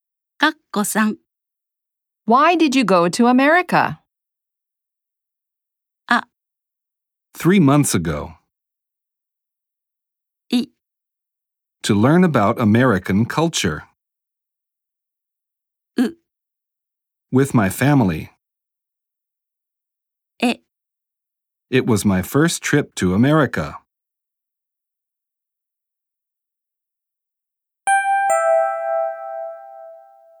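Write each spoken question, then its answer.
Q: Why did you go to America?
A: I: To learn about American culture.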